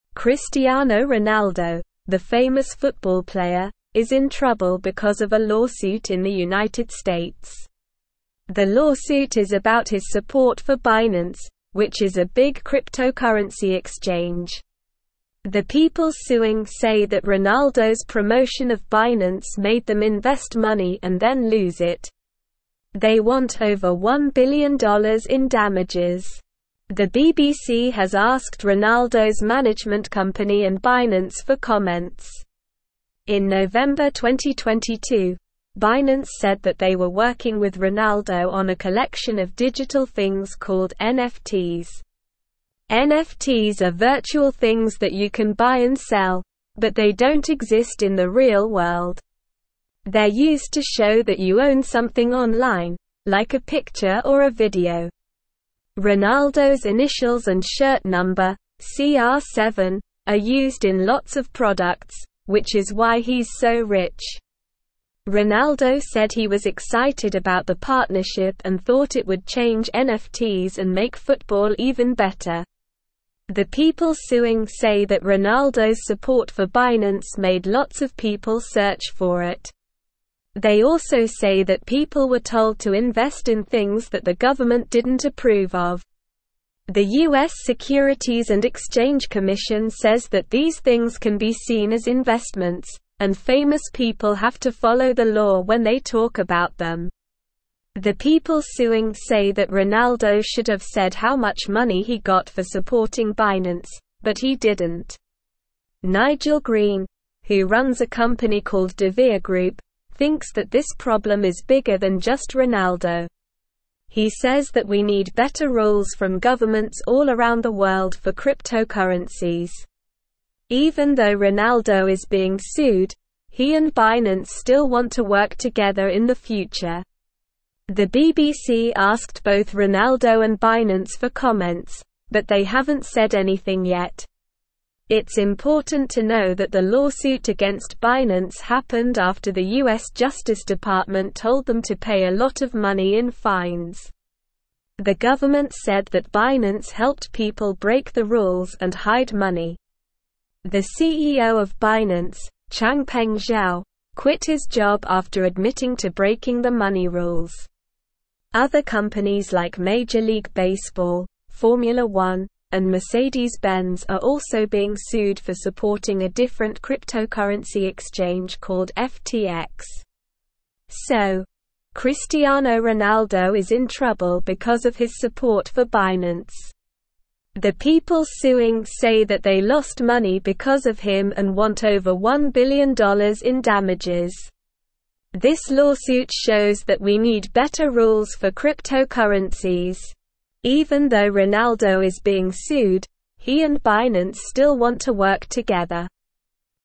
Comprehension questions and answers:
Listen and Fill in the Gaps:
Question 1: Cristiano Ronaldo, the famous football player, is in (1)______ because of a (2)______ in the United States.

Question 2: Cristiano Ronaldo, the famous football player, is in (1)______ because of a (2)______ in the United States.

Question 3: The people (3)______ say that Ronaldo's promotion of Binance made them invest money and then lose it.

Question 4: In November 2022, Binance said that they were working with Ronaldo on a collection of digital (4)______ called NFTs.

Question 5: They're used to show that you own something online, like a picture or a (5)______.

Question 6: (6)______'s (7)______ and shirt number, "CR7," are used in lots of products, which is why he's so rich.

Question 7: (6)______'s (7)______ and shirt number, "CR7," are used in lots of products, which is why he's so rich.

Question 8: The people suing say that Ronaldo's (8)______ for Binance made lots of people search for it.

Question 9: The people suing say that Ronaldo should have said how much (9)______ he got for supporting Binance, but he didn't.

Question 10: (10)______ Green, who runs a (11)______ called DeVere Group, thinks that this problem is bigger than just Ronaldo.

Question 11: (10)______ Green, who runs a (11)______ called DeVere Group, thinks that this problem is bigger than just Ronaldo.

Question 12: It's important to know that the lawsuit against Binance happened after the US Justice Department told them to pay a lot of money in (12)______.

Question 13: The government said that (13)______ (14)______ people (15)______ the rules and hide money.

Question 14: The government said that (13)______ (14)______ people (15)______ the rules and hide money.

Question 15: The government said that (13)______ (14)______ people (15)______ the rules and hide money.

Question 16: Other companies like Major (16)______ Baseball, Formula 1, and Mercedes-Benz are also being sued for supporting a different cryptocurrency exchange called FTX.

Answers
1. trouble
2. lawsuit
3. suing
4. things
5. video
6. Ronaldo
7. initials
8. support
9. money
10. Nigel
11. company
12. fines
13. Binance
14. helped
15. break
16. League

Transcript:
Cristiano Ronaldo, the famous football player, is in trouble because of a lawsuit in the United States. The lawsuit is about his support for Binance, which is a big cryptocurrency exchange. The people suing say that Ronaldo's promotion of Binance made them invest money and then lose it. They want over $1 billion in damages. The BBC has asked Ronaldo's management company and Binance for comments.
In November 2022, Binance said that they were working with Ronaldo on a collection of digital things called NFTs. NFTs are virtual things that you can buy and sell, but they don't exist in the real world. They're used to show that you own something online, like a picture or a video. Ronaldo's initials and shirt number, "CR7," are used in lots of products, which is why he's so rich. Ronaldo said he was excited about the partnership and thought it would change NFTs and make football even better.
The people suing say that Ronaldo's support for Binance made lots of people search for it. They also say that people were told to invest in things that the government didn't approve of. The US Securities and Exchange Commission says that these things can be seen as investments, and famous people have to follow the law when they talk about them. The people suing say that Ronaldo should have said how much money he got for supporting Binance, but he didn't.
Nigel Green, who runs a company called DeVere Group, thinks that this problem is bigger than just Ronaldo. He says that we need better rules from governments all around the world for cryptocurrencies. Even though Ronaldo is being sued, he and Binance still want to work together in the future. The BBC asked both Ronaldo and Binance for comments, but they haven't said anything yet.
It's important to know that the lawsuit against Binance happened after the US Justice Department told them to pay a lot of money in fines. The government said that Binance helped people break the rules and hide money. The CEO of Binance, Changpeng Zhao, quit his job after admitting to breaking the money rules. Other companies like Major League Baseball, Formula 1, and Mercedes-Benz are also being sued for supporting a different cryptocurrency exchange called FTX.
The people suing say that they lost money because of him and want over $1 billion in damages. This lawsuit shows that we need better rules for cryptocurrencies.

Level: Level 3